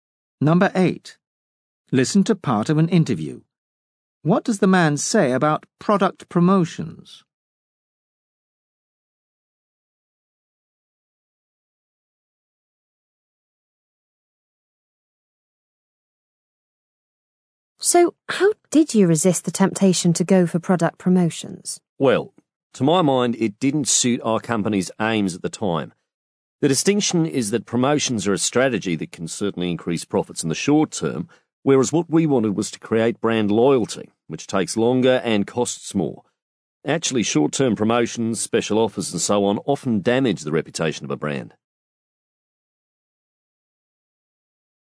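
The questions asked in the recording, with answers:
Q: What does the man say about product promotions?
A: They boost short-term profit but can damage a brand's reputation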